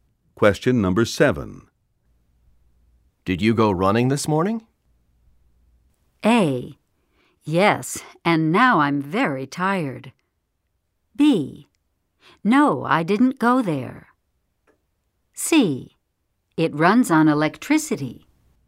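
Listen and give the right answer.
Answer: A: Yes, and now I'm very tired.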